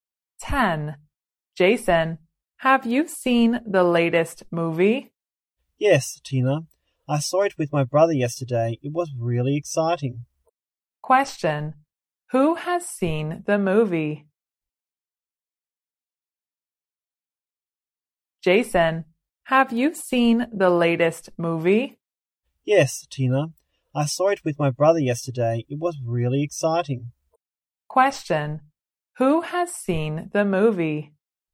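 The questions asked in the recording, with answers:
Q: Who has seen the movie?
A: Jason (and his brother)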